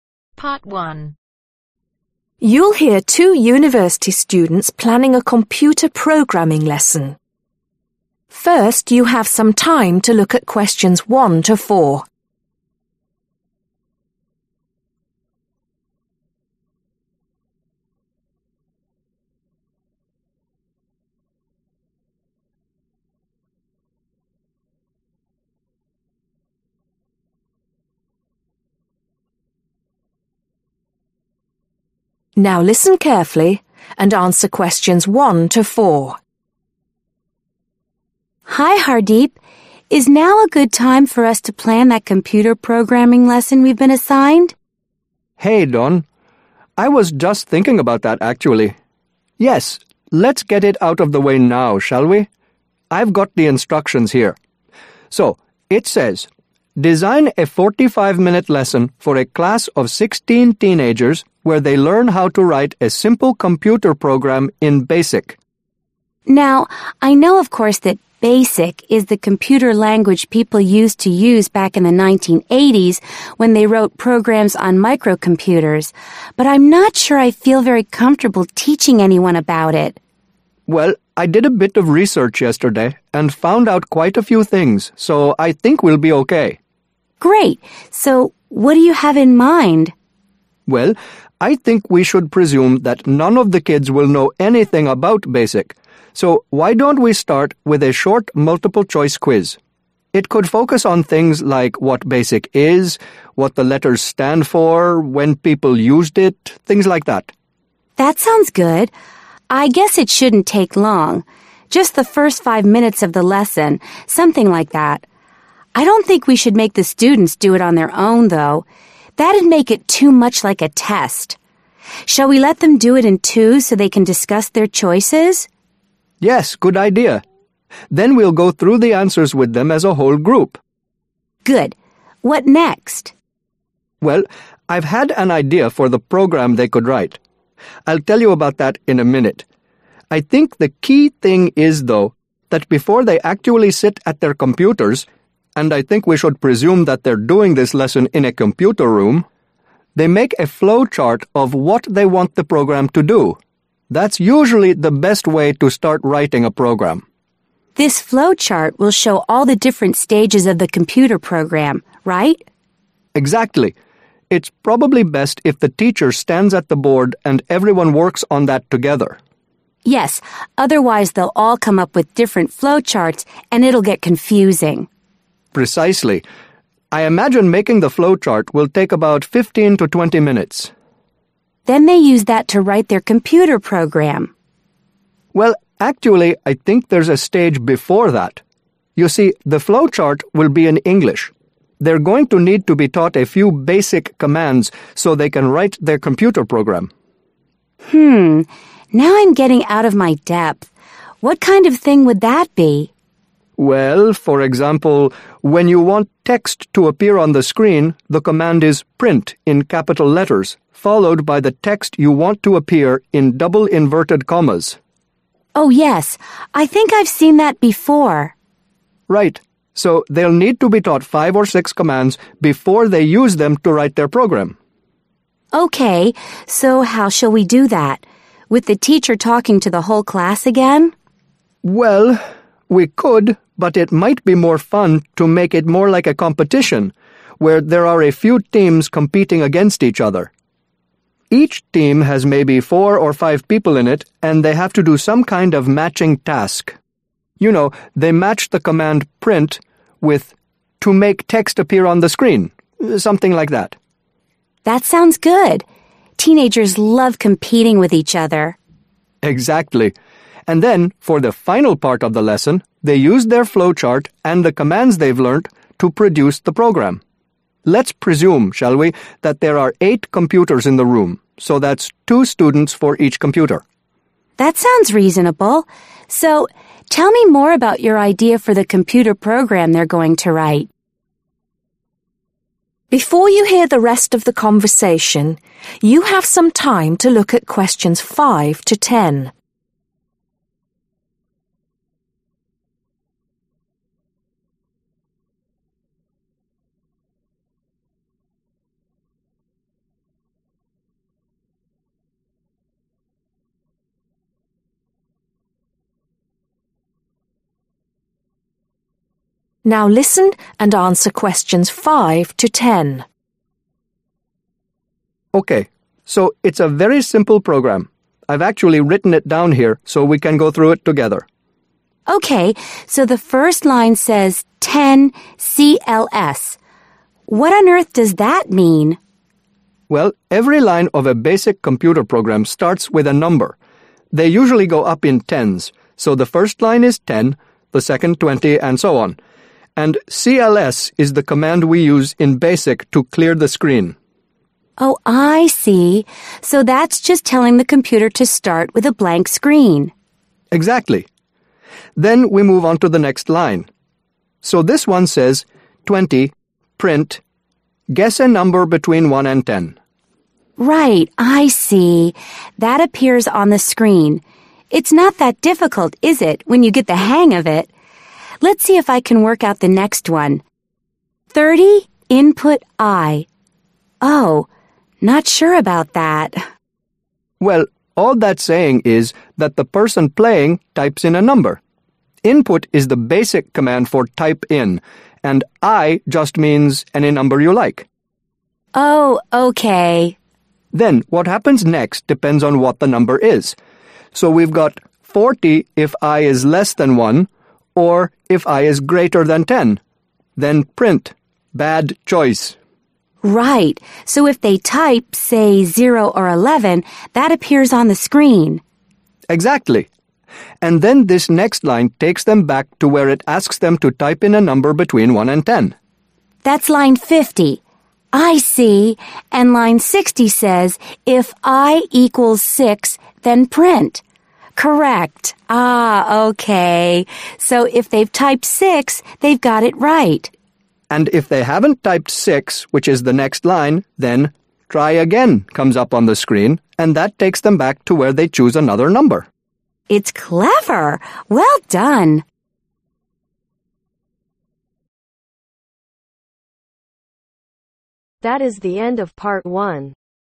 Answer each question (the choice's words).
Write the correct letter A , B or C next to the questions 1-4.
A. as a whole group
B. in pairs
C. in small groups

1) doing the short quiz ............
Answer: in pairs

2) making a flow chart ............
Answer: as a whole group

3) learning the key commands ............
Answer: in small groups

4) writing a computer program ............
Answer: in pairs

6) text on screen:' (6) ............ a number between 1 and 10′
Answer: Guess

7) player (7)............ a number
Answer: Types in

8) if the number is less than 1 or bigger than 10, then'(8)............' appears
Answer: Bad choice

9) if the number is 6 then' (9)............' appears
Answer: Correct

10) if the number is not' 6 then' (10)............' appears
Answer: Try again